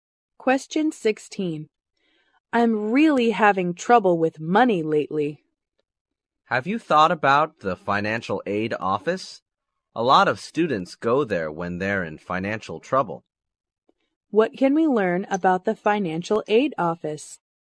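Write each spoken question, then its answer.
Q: What can we learn about the financial aid office?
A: Many students go there for help when they have money problems.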